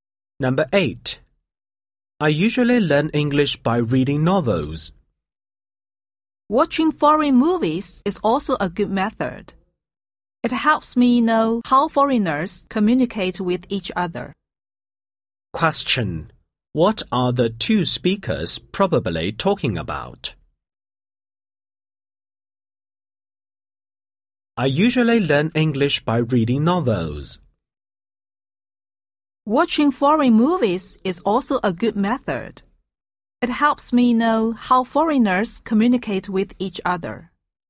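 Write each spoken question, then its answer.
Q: What are the two speakers probably talking about?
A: Ways to learn English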